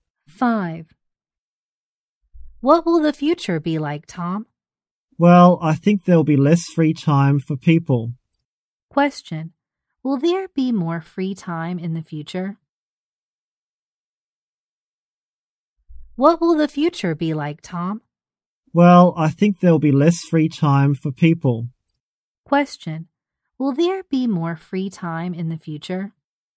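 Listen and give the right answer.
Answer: No, there will be less free time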